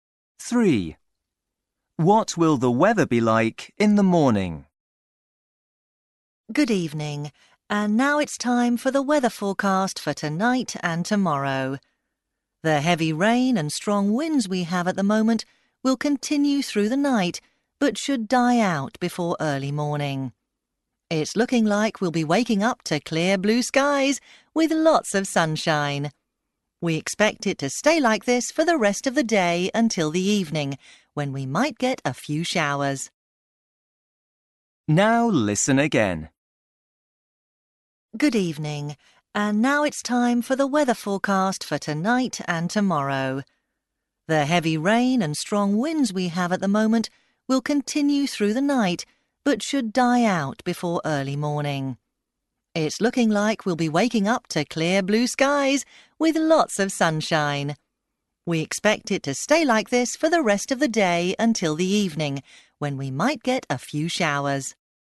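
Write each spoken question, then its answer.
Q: What will the weather be like in the morning?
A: Sunny with clear blue skies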